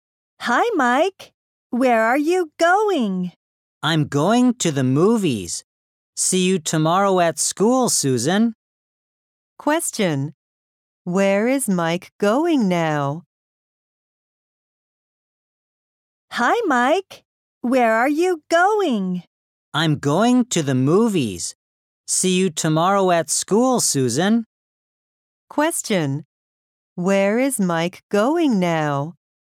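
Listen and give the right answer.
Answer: To the movies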